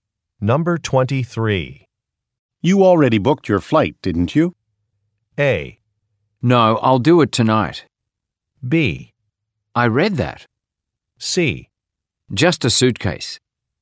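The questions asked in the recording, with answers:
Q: You already booked your flight, didn't you?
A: A: No, I'll do it tonight.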